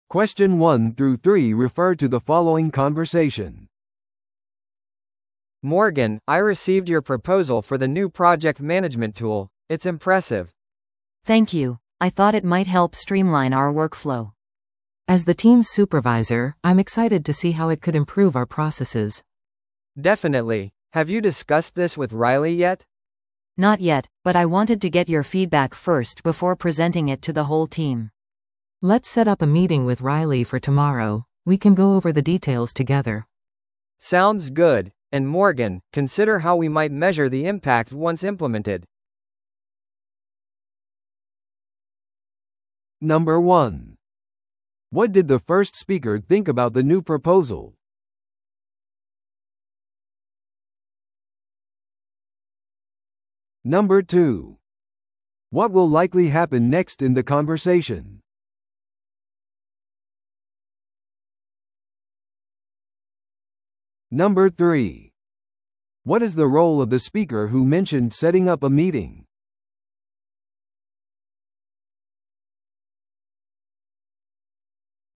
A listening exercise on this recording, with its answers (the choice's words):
Listen to the audio below and answer the questions.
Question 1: What did the first speaker think about the new proposal?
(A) より詳細なデータが必要だ。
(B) 現在のリソースでは実現不可能だ。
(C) 印象的でチームの助けになりそうだ。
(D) すでに使用しているツールに似ている。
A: 印象的でチームの助けになりそうだ。

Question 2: What will likely happen next in the conversation?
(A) スーパーバイザーにより提案が承認される。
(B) チームがすぐにツールを導入する。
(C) ライリーとの会議がスケジュールされる。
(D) 提案が改訂プロセスを経る。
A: ライリーとの会議がスケジュールされる。

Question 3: What is the role of the speaker who mentioned setting up a meeting?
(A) プロジェクト管理ツールの開発者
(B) チームのスーパーバイザー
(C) 部門長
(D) チームトレーナー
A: チームのスーパーバイザー

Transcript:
A: Morgan, I received your proposal for the new project management tool. It's impressive!
B: Thank you! I thought it might help streamline our workflow.
C: As the team's supervisor, I'm excited to see how it could improve our processes.
A: Definitely. Have you discussed this with Riley yet?
B: Not yet, but I wanted to get your feedback first before presenting it to the whole team.
C: Let's set up a meeting with Riley for tomorrow. We can go over the details together.
A: Sounds good. And Morgan, consider how we might measure the impact once implemented.